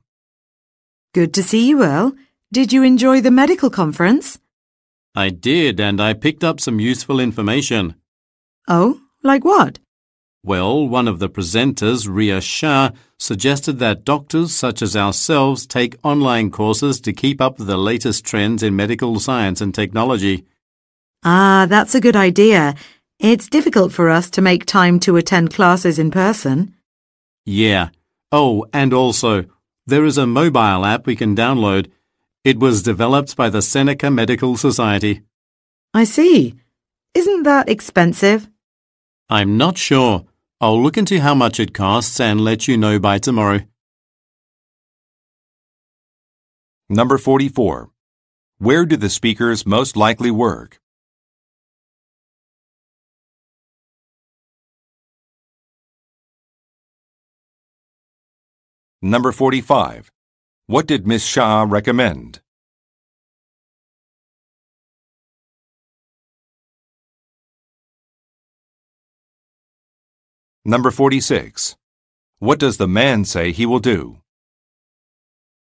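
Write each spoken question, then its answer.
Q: What did Ms. Shah recommend?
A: That doctors take online courses

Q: What does the man say he will do?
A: Find out how much the mobile app costs and let her know by tomorrow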